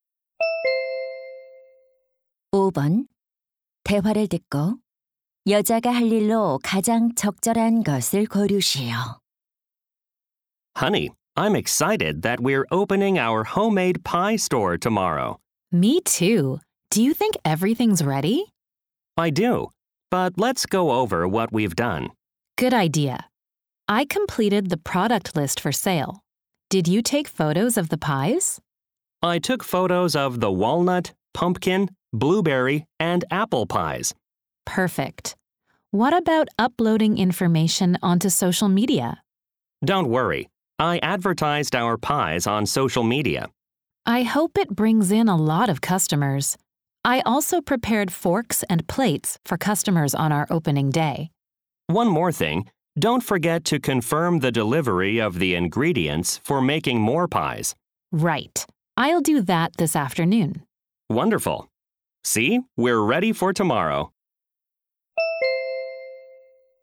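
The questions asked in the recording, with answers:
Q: 대화를 듣고 여자가 할 일로 가장 적절한 것을 고르시오.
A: 재료 배송 확인하기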